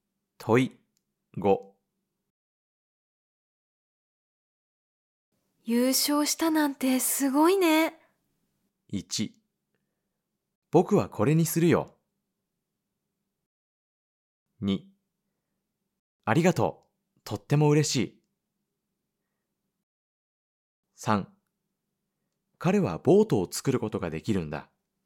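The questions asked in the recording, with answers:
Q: 優勝したなんてすごいね。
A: 2: ありがとう。とっても嬉しい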